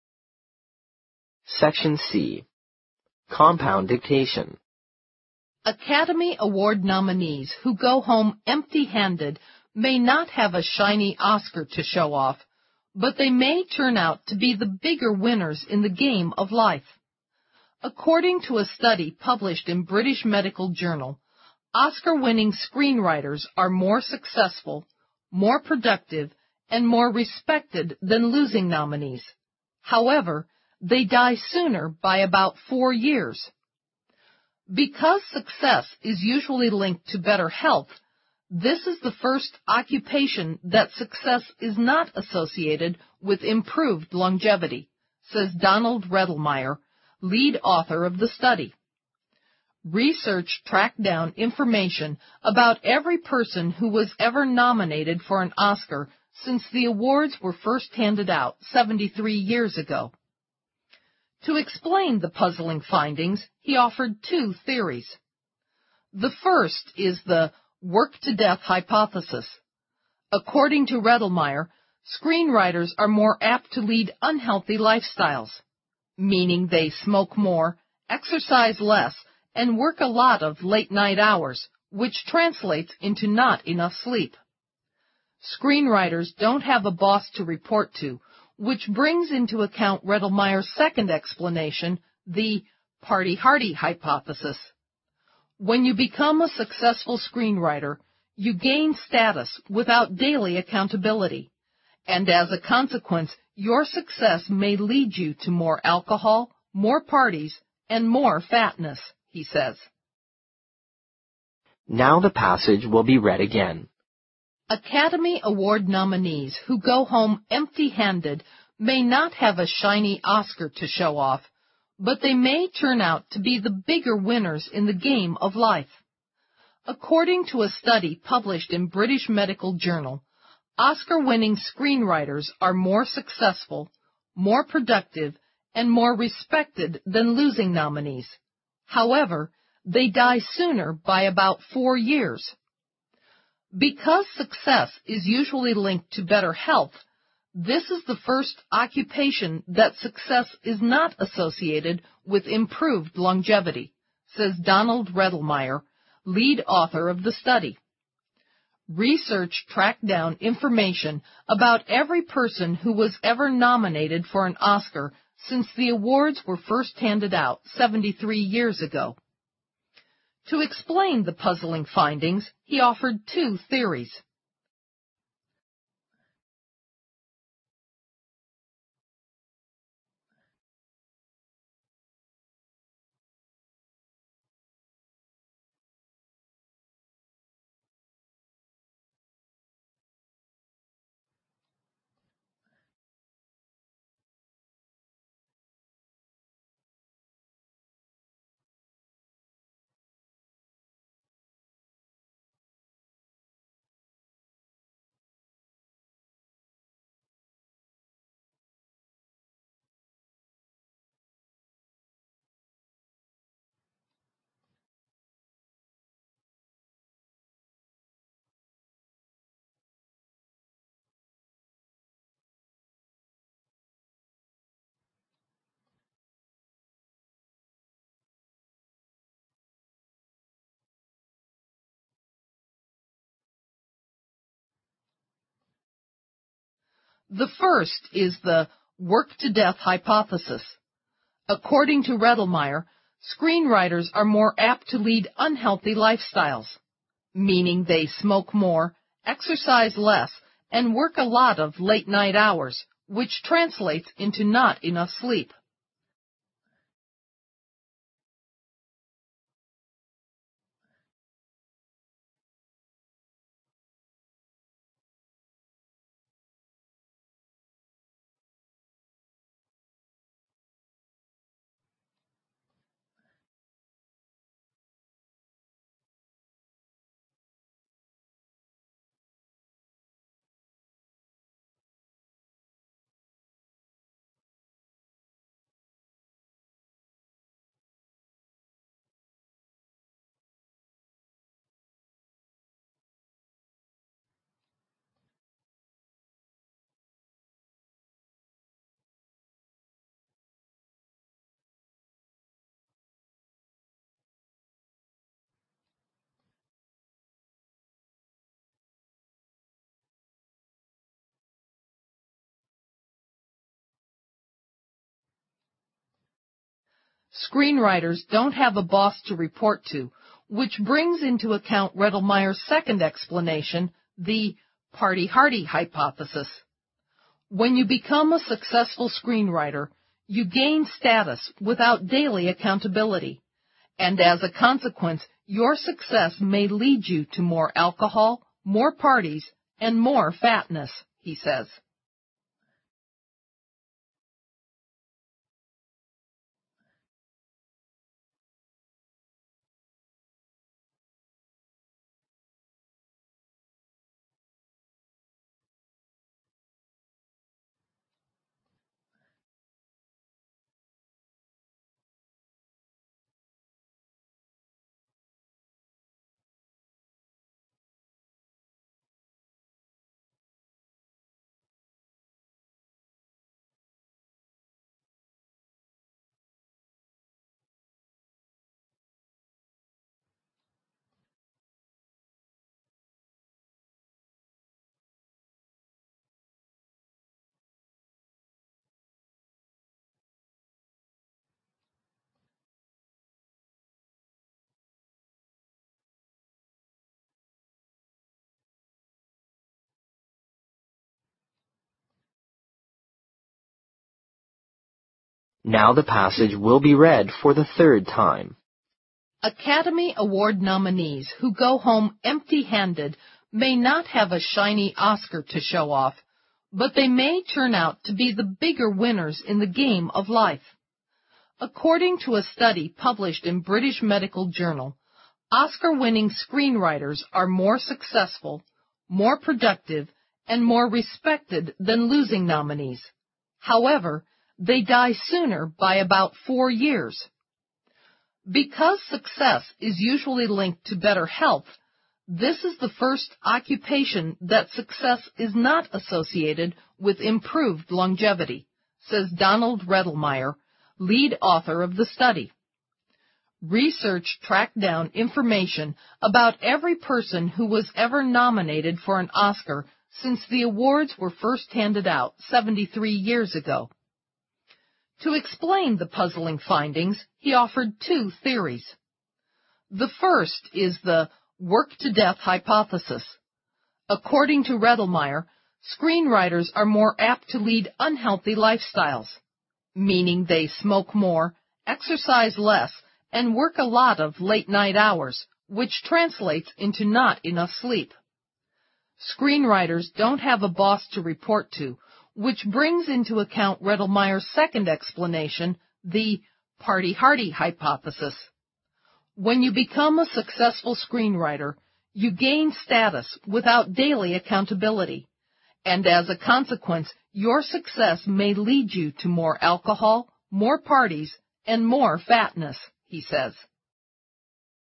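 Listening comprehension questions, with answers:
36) Academy Award nominees (被提名的人) who go home (36) ______ may not have a shiny Oscar to show off, but they may turn out to be the bigger winners in the game of life.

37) According to a study published in British Medical Journal, Oscar-winning screenwriters are more successful, more (37) ______ and more (38) ______ than losing nominees; however, they die sooner by about four years.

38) According to a study published in British Medical Journal, Oscar-winning screenwriters are more successful, more (37) ______ and more (38) ______ than losing nominees; however, they die sooner by about four years.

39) "Because success is usually linked to better (39) ______ , this is the first (40) ______ that success is not associated with (41) ______ longevity."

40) "Because success is usually linked to better (39) ______ , this is the first (40) ______ that success is not associated with (41) ______ longevity."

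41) "Because success is usually linked to better (39) ______ , this is the first (40) ______ that success is not associated with (41) ______ longevity."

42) Research tracked down (42) ______ about every person who was ever nominated for an Oscar since the (43) were first handed out 73 years ago.______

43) Research tracked down (42) ______ about every person who was ever nominated for an Oscar since the (43) were first handed out 73 years ago.______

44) (44) _______________________________________________________________ . The first is the "work-to-death hypothesis (假设)".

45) According to Redelmeier, screenwriters are more apt to lead unhealthy lifestyles, (45) _______________________________________________________ .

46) "When you become a successful screenwriter, you gain status without daily accountability (生计), (46) _________________________________________________________________ ."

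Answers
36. empty-handed
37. productive
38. respected
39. health
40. occupation
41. improved
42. information
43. awards
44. To explain the puzzling findings, he offered two theories
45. meaning they smoke more, exercise less, and work a lot of late-night hours, which translates into not enough sleep
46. and as a consequence, your success may lead you to more alcohol, more parties, and more fatness

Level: 四级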